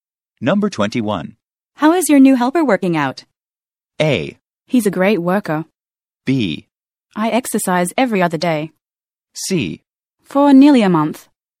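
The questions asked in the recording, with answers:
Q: How is your new helper working out?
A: A: He's a great worker.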